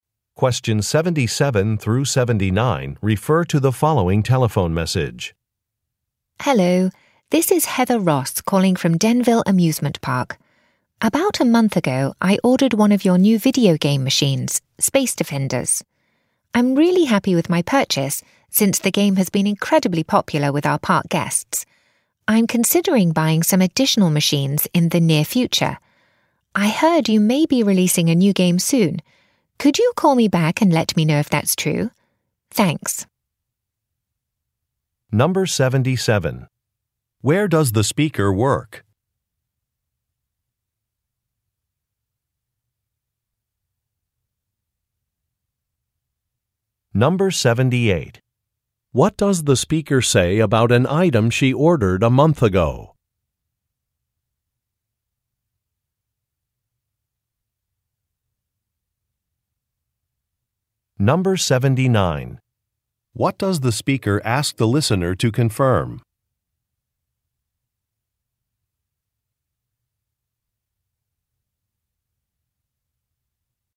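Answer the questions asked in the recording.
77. At an amusement park
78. It has been very popular with park guests
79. Whether a new game will be released soon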